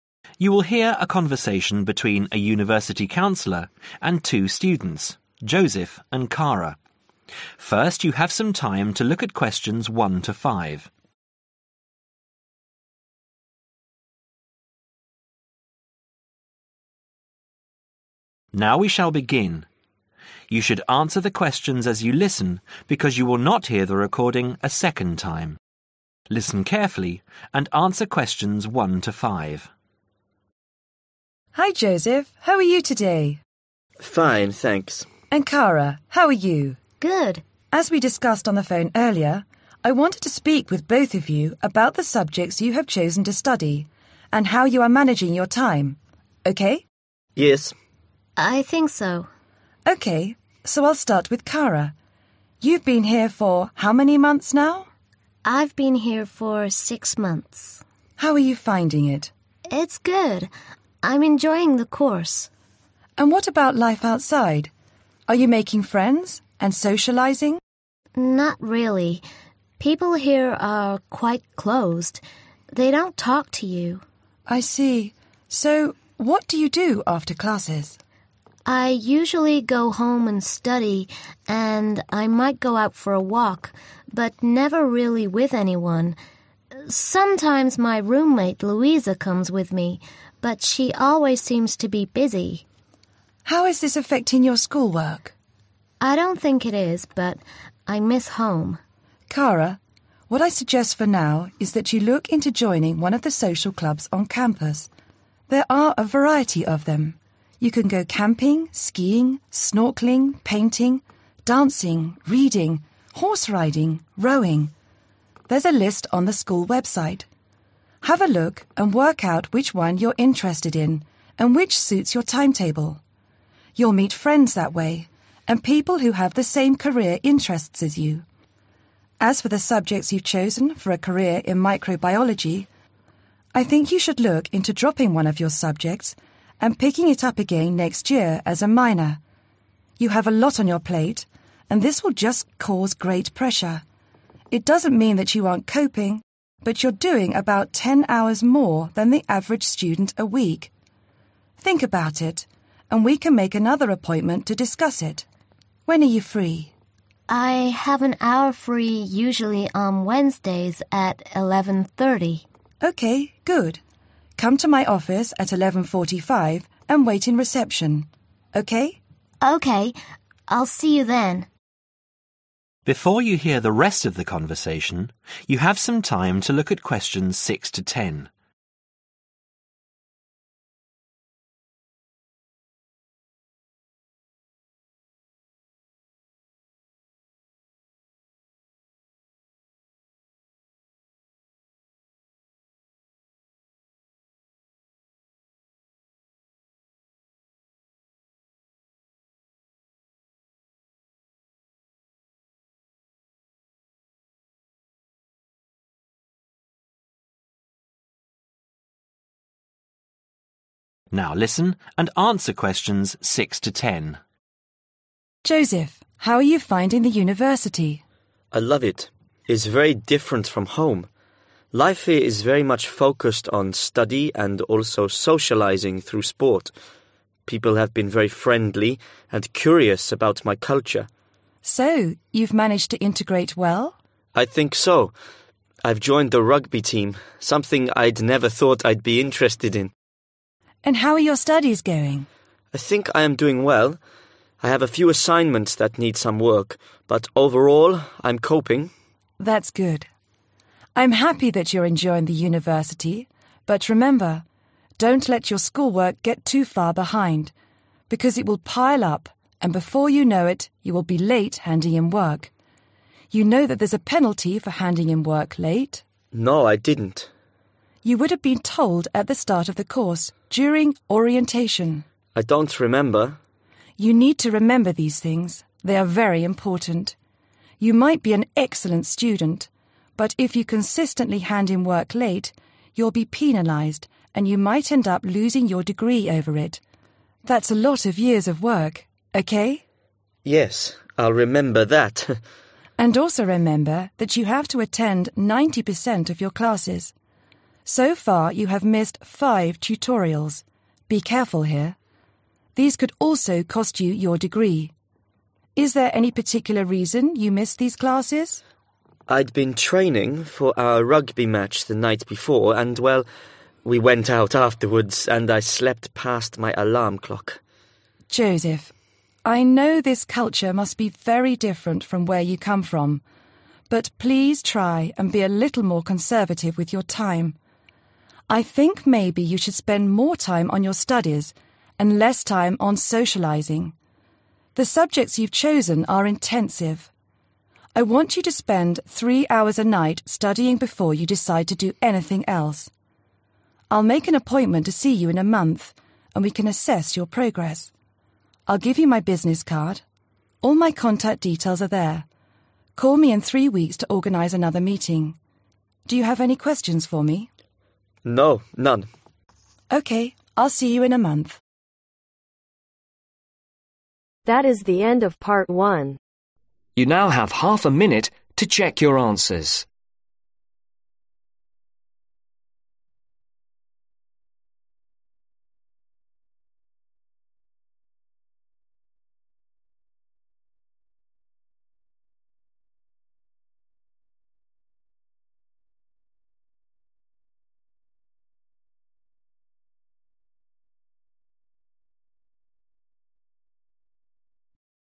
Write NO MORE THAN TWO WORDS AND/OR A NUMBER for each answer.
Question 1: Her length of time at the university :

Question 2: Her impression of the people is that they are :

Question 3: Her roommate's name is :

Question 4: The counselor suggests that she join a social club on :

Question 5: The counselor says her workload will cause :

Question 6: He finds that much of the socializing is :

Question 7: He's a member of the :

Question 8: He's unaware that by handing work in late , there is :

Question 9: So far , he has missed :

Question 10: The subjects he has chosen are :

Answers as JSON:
{"1": "Six Month", "2": "(quite) Closed", "3": "Louisa", "4": "Campus", "5": "Great Pressure", "6": "Through Sport", "7": "Rugby Team", "8": "a Penalty", "9": "Five Tutorials", "10": "Intensive"}